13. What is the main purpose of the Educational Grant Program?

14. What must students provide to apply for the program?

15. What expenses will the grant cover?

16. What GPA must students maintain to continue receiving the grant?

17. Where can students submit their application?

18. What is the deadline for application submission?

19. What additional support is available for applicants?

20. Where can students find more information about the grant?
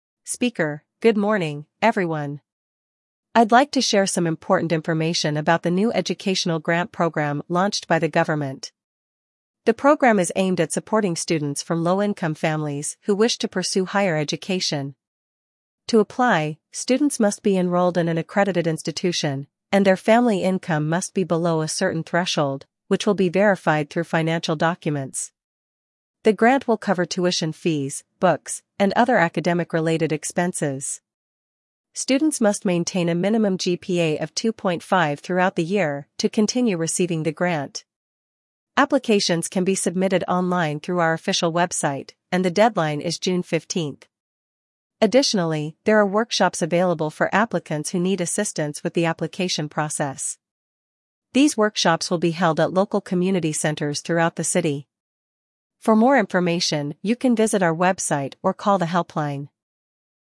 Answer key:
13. To support students from low-income families pursuing higher education.
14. Financial documents to verify family income.
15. Tuition fees, books, and academic-related expenses.
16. A minimum GPA of 2.5.
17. Online, through the official website.
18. June 15th.
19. Workshops on the application process.
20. Website or helpline.

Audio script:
Speaker: Good morning, everyone. I'd like to share some important information about the new Educational Grant Program launched by the government. The program is aimed at supporting students from low-income families who wish to pursue higher education. To apply, students must be enrolled in an accredited institution, and their family income must be below a certain threshold, which will be verified through financial documents.
The grant will cover tuition fees, books, and other academic-related expenses. Students must maintain a minimum GPA of 2.5 throughout the year to continue receiving the grant. Applications can be submitted online through our official website, and the deadline is June 15th.
Additionally, there are workshops available for applicants who need assistance with the application process. These workshops will be held at local community centers throughout the city. For more information, you can visit our website or call the helpline.